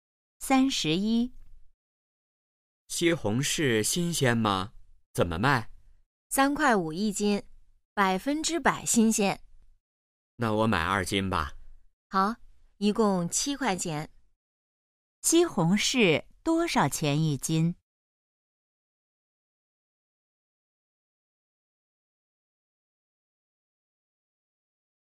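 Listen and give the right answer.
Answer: 三块五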